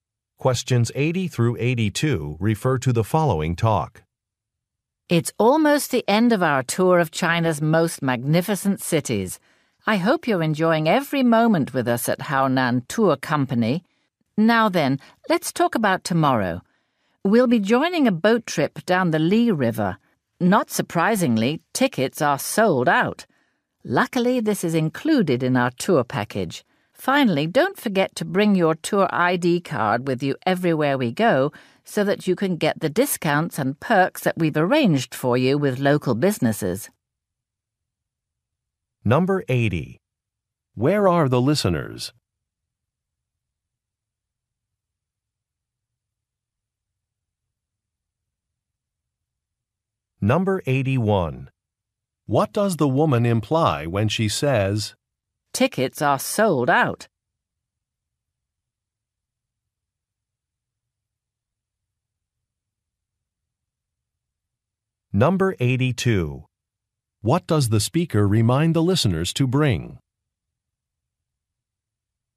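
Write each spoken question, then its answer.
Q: Where are the listeners?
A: On a tour in China

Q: What does the speaker remind the listeners to bring?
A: Their tour ID card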